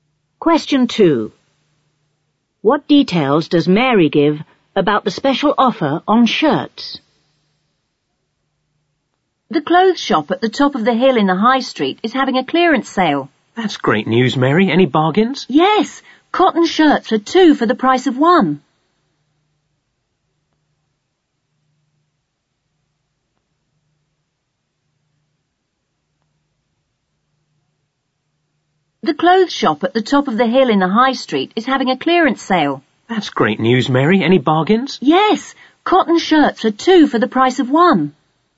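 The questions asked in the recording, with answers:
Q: What details does Mary give about the special offer on shirts?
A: Cotton shirts, 2 for the price of 1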